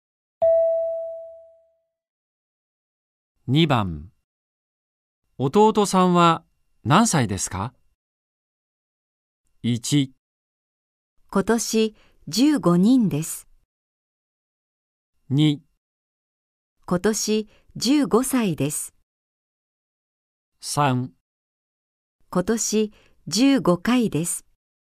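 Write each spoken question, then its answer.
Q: 弟さんは何歳ですか。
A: 2: 今年15歳です。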